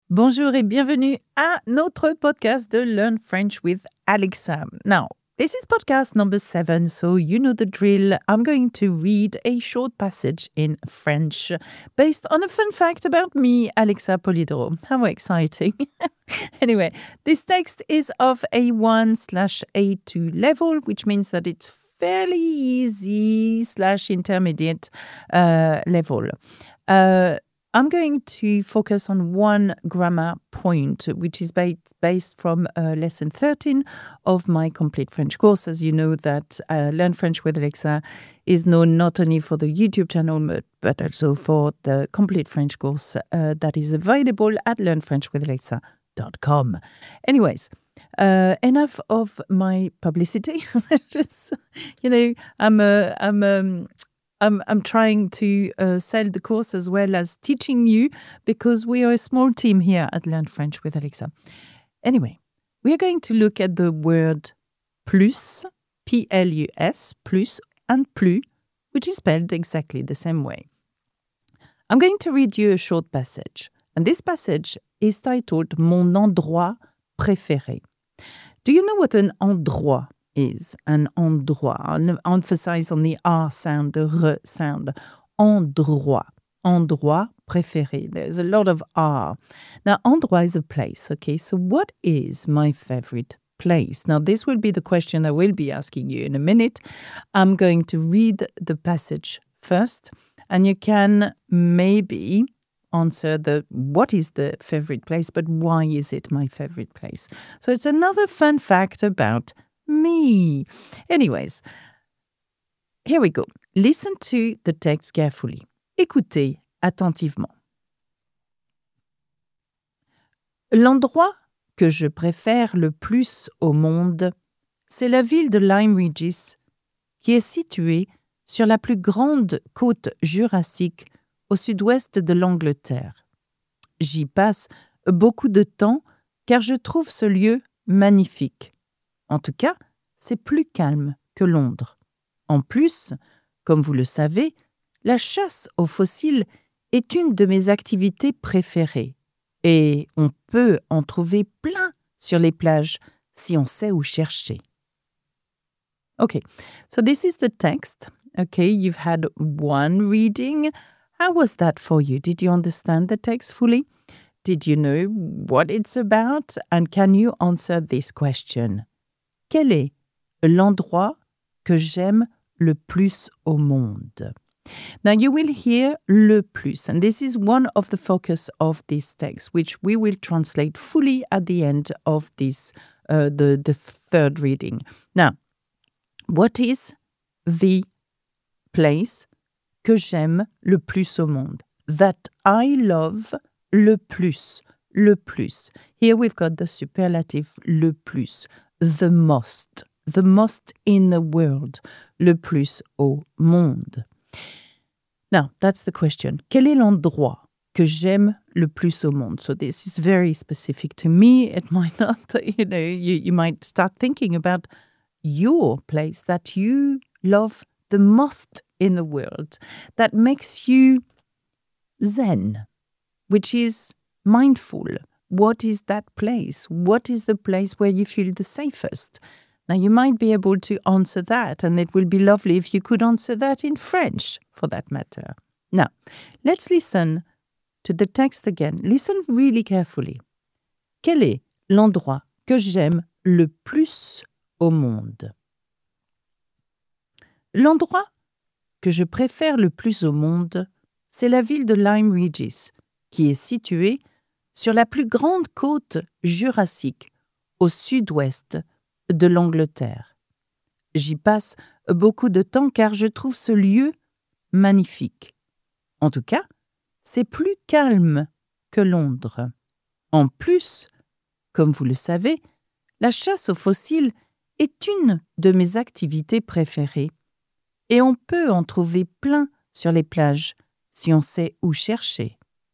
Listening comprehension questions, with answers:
Quel est l'endroit que j'aime le plus au monde ?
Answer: la ville de Lyme Regis